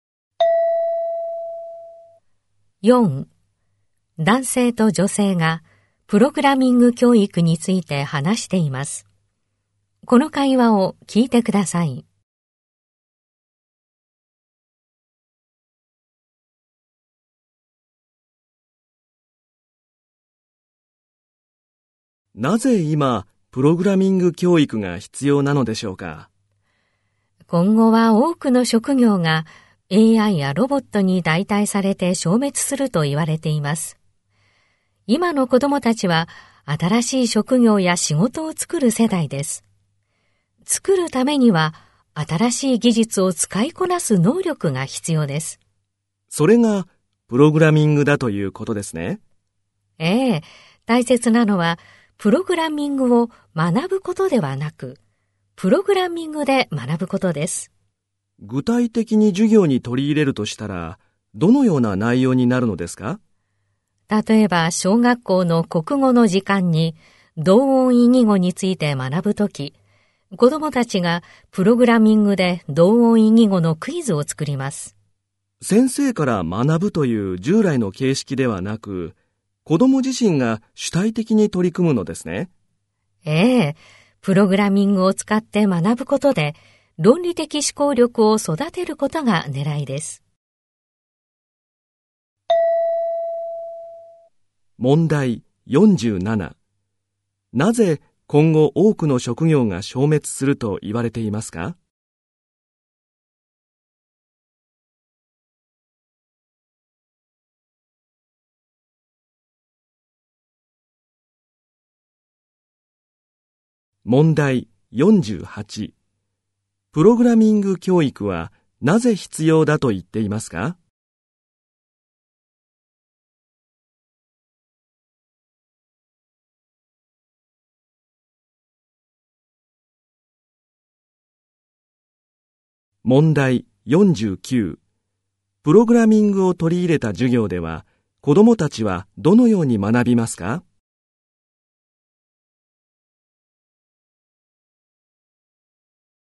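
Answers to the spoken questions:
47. AIやロボットに代替されるから
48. 新しい職業を作るために新しい技術を使いこなす能力が必要だから
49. プログラミングでクイズを作るなど主体的に学ぶ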